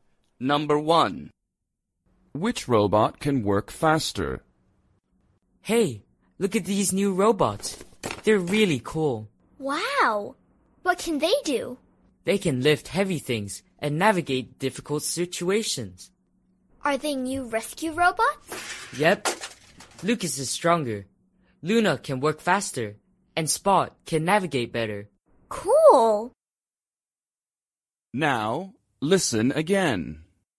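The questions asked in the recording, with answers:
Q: Which robot can work faster?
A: Luna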